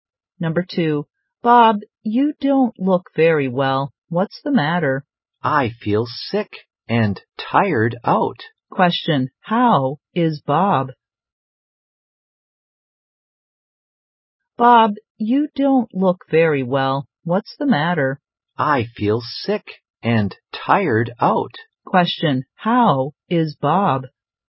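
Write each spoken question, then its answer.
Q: Question, how is Bob?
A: He feels sick and tired out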